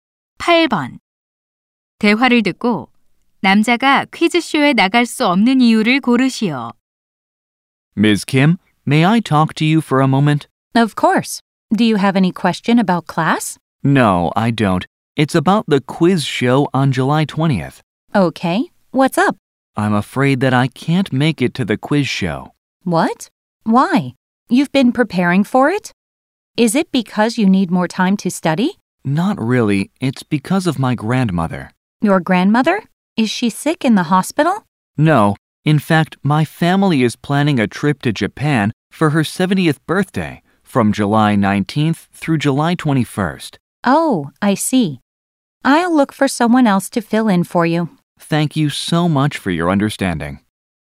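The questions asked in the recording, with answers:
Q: 대화를 듣고 남자가 퀴즈쇼에 나갈 수 없는 이유를 고르시오.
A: 할머니 70세 생신 기념 일본 가족 여행 때문에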